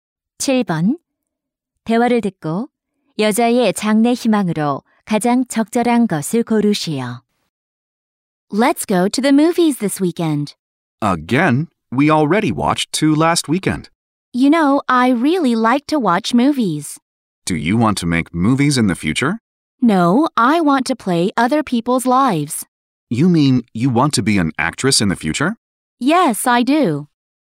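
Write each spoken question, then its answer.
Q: 대화를 듣고 여자의 장래 희망으로 가장 적절한 것을 고르시오.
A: 배우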